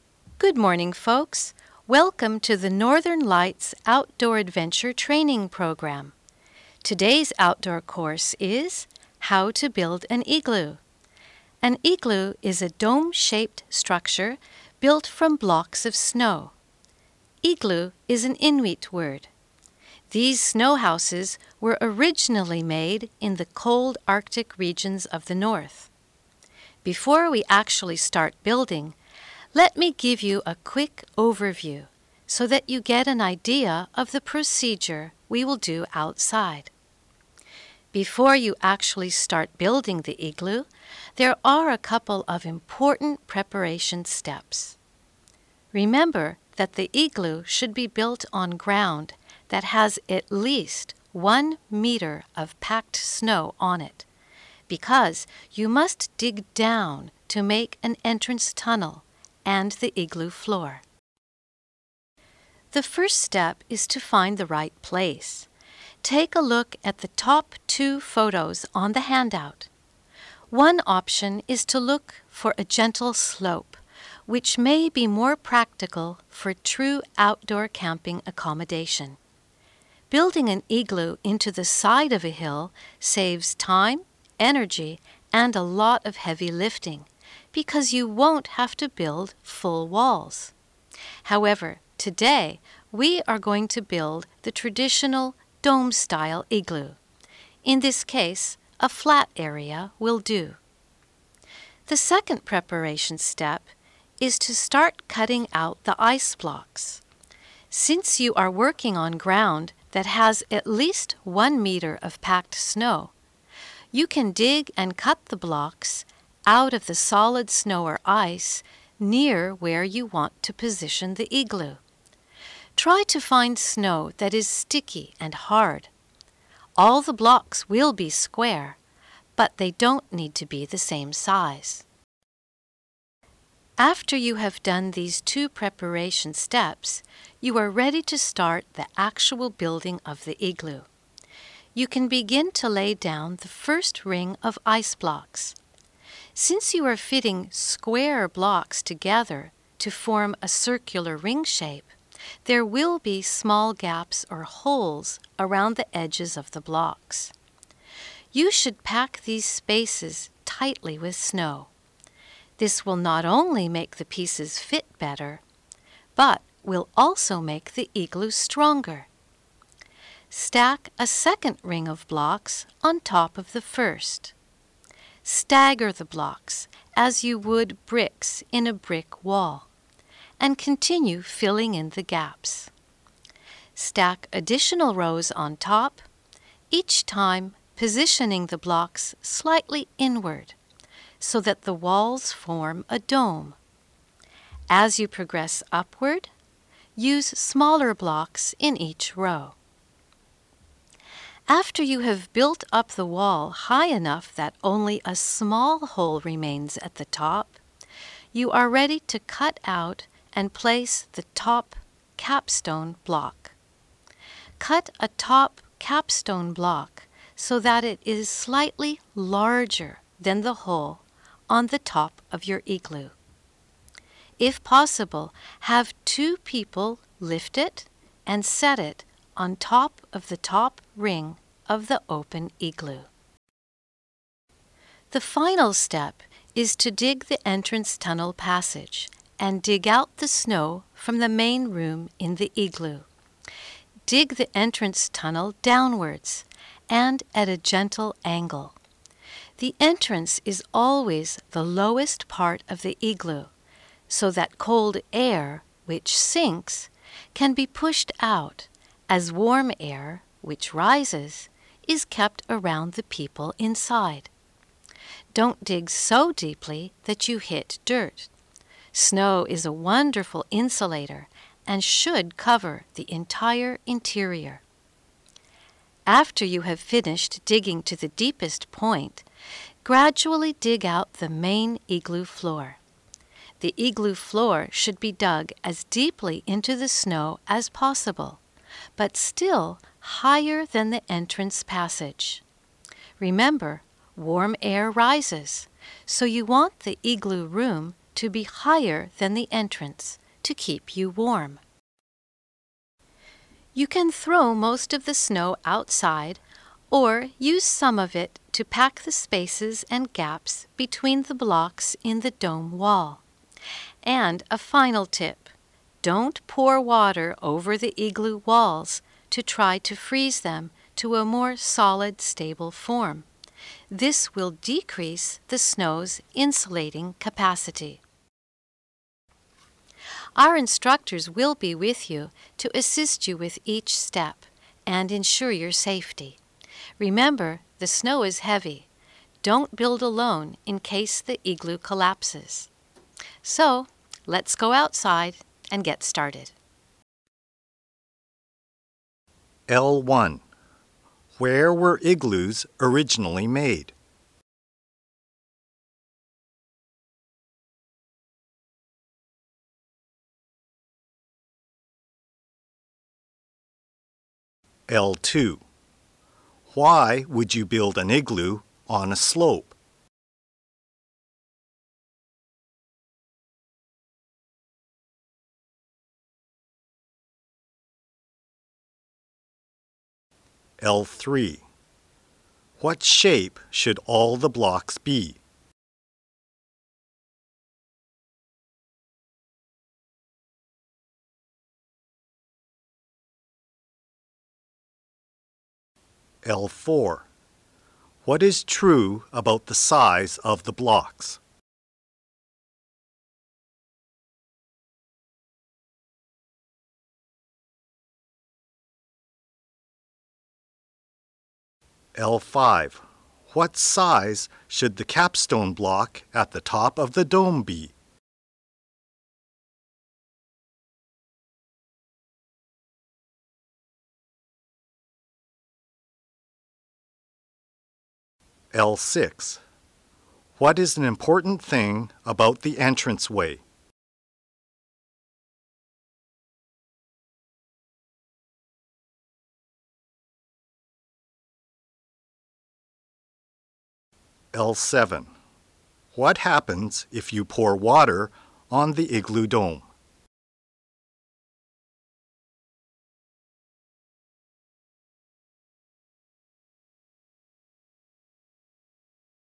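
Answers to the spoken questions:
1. In the cold Arctic regions of the north
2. It saves time, energy and heavy lifting because you don't build full walls
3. Square
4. They don't need to be the same size; smaller blocks higher up
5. Slightly larger than the hole
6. It must be the lowest part of the igloo
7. It decreases the snow's insulating capacity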